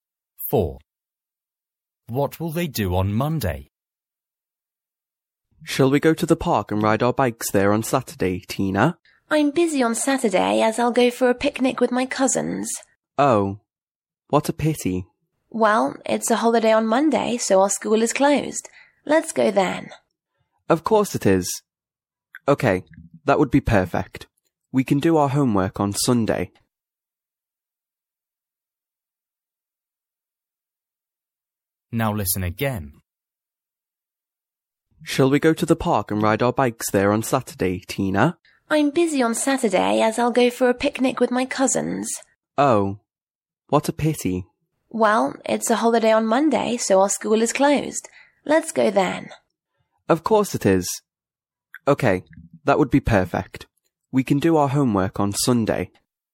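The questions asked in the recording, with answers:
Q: What will they do on Monday?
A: ride their bikes in the park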